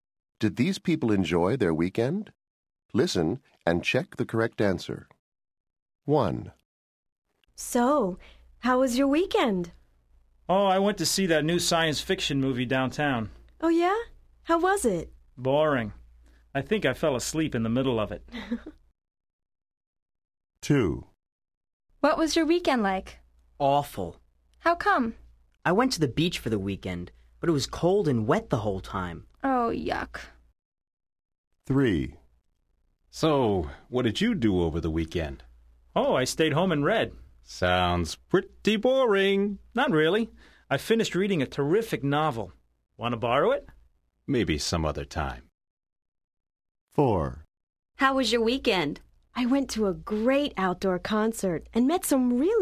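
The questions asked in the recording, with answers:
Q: Did these people enjoy their weekend?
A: No

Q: Did these people enjoy their weekend?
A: No

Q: Did these people enjoy their weekend?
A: Yes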